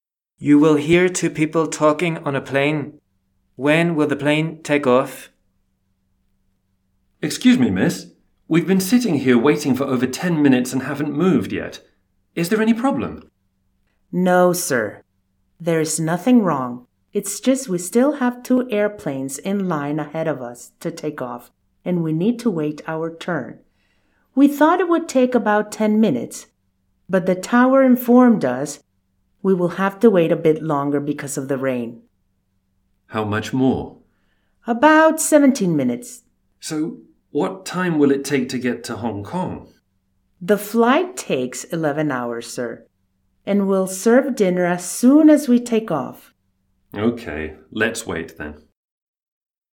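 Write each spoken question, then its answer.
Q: When will the plane take off?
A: In about 17 minutes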